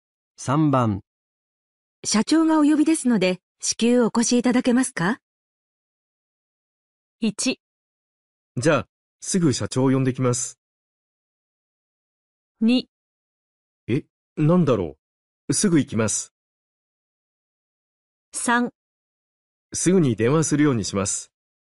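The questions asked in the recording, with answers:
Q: 社長がお呼びですので、至急お越しいただけますか?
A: 2: え、なんだろう。すぐ行きます。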